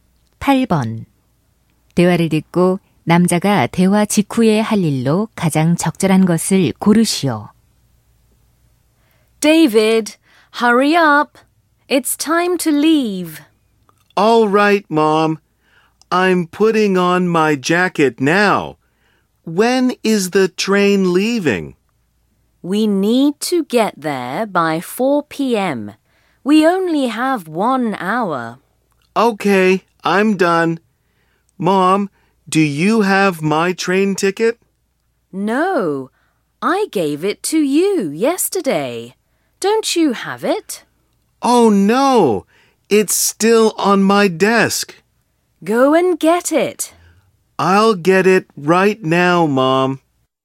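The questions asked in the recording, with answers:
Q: 대화를 듣고 남자가 대화 직후에 할 일로 가장 적절한 것을 고르시오.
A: 책상에 있는 기차표를 가져오기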